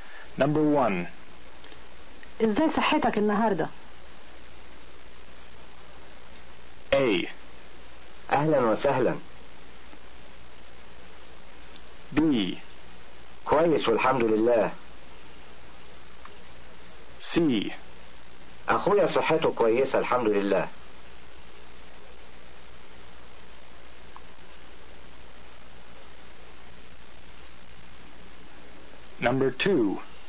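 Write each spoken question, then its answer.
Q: إزاي صحتك النهاردة؟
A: B: كويس والحمد لله.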